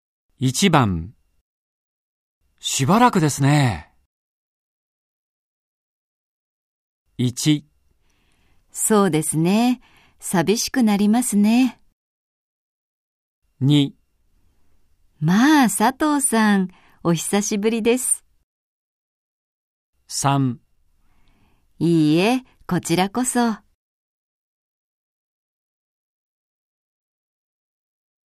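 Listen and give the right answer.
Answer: 2: まあ佐藤さん、お久しぶりです。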